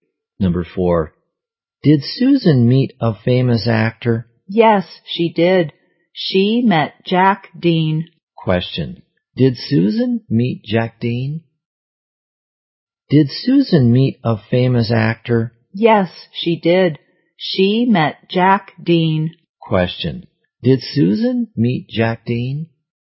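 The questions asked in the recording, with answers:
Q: Question. Did Susan meet Jack Dean?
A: Yes, she did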